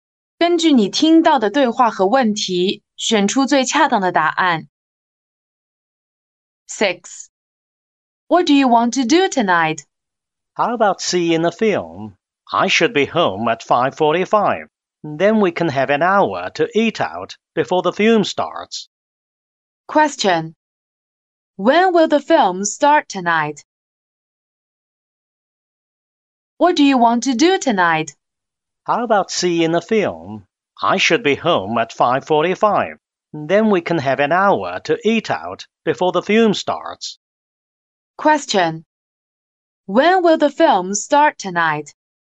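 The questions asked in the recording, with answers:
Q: When will the film start tonight?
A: At 6:45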